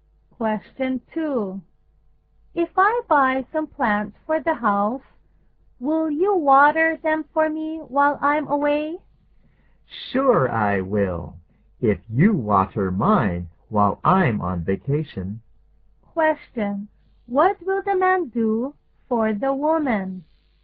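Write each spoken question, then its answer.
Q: What will the man do for the woman?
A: Water her plants while she is away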